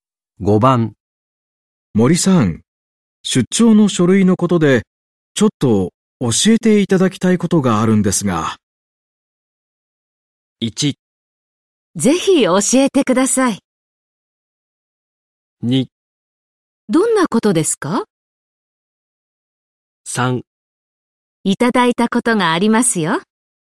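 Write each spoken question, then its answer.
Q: 森さん、出張の書類のことでちょっと教えていただきたいことがあるんですが。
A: 2: どんなことですか?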